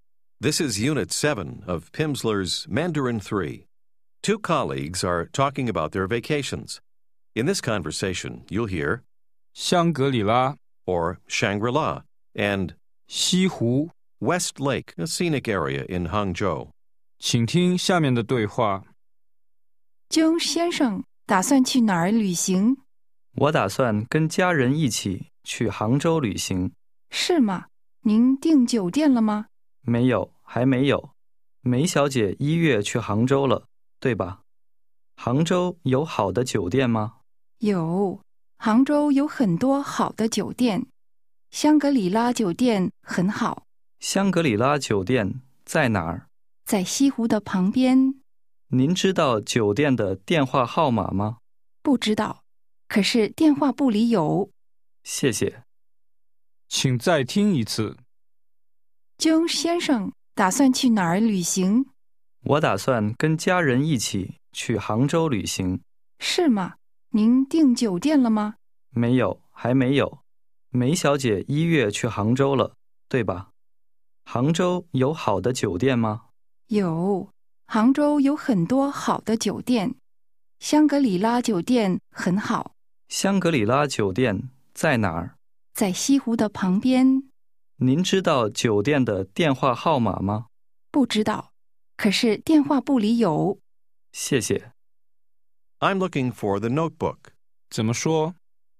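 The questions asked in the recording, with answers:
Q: 江先生打算去哪儿旅行?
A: 杭州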